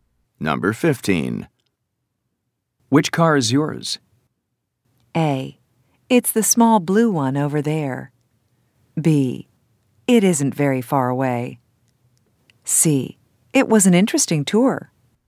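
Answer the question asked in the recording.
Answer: A: It's the small blue one over there.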